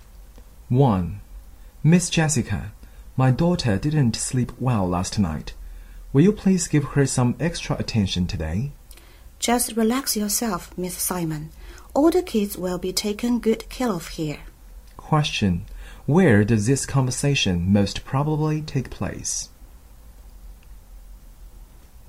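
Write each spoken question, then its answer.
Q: Where does this conversation most probably take place?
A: At a kindergarten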